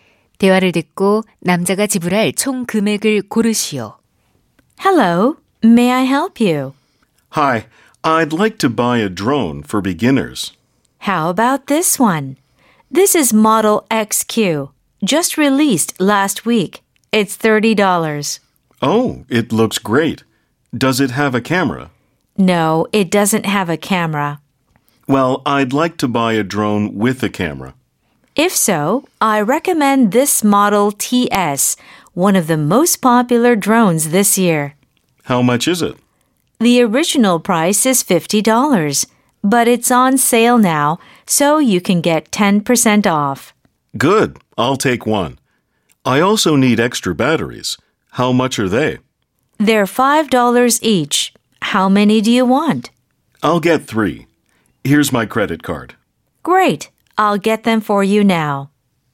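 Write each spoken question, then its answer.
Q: 대화를 듣고 남자가 지불할 총 금액을 고르시오.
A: $60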